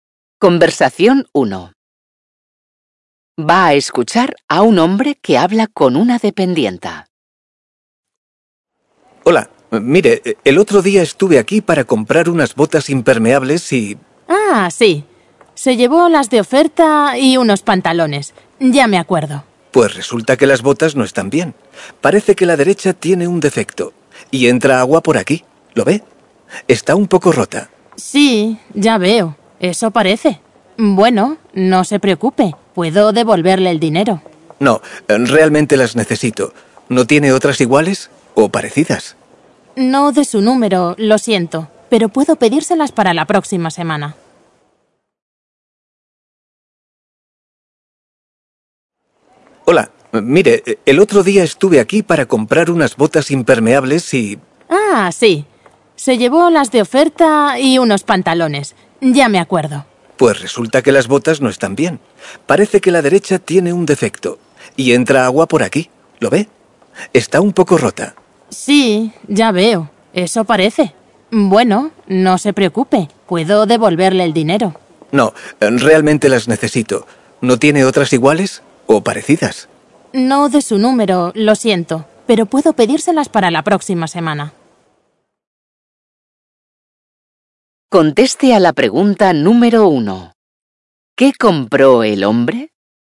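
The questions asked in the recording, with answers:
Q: ¿Qué compró el hombre?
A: Unas botas impermeables (de oferta) y unos pantalones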